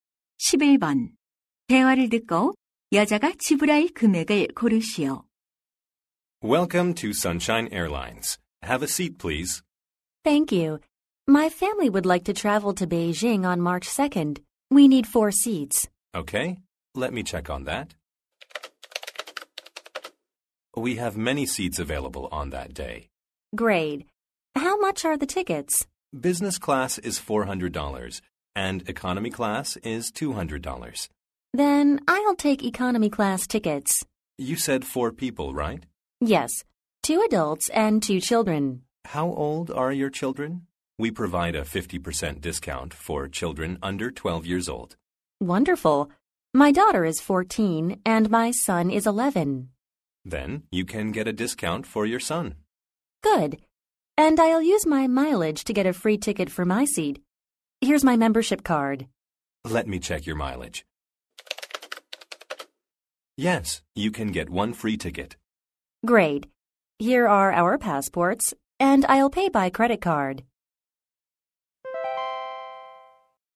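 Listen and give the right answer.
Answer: 500달러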